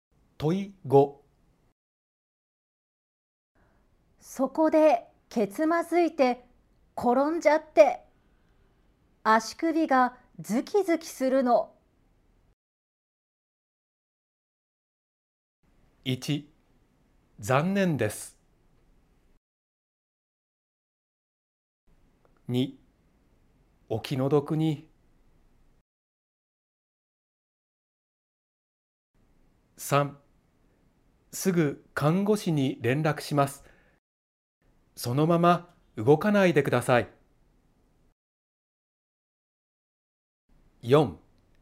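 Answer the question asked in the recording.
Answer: 3: すぐ看護師に連絡します。そのまま動かないでください。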